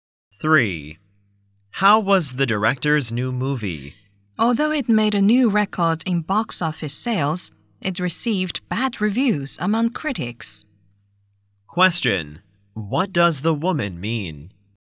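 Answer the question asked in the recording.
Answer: The movie sold well but critics disliked it.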